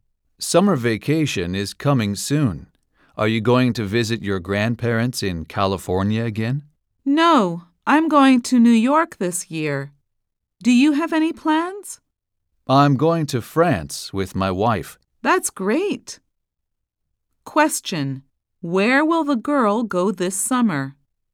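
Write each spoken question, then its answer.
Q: where will the girl go this summer?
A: To New York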